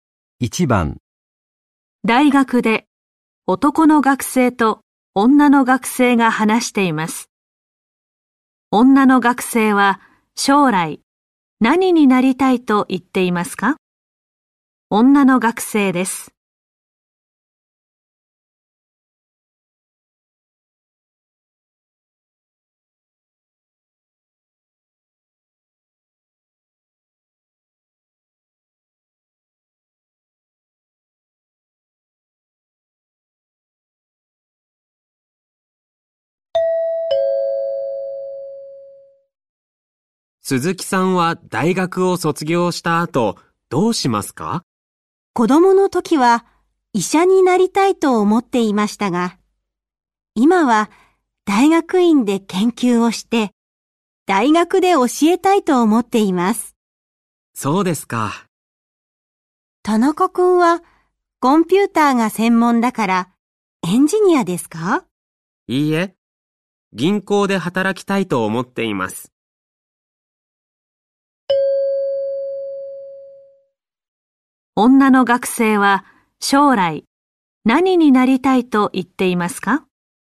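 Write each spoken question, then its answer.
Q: 女の学生は将来何になりたいと言っていますか?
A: 大学で教える人(大学の先生)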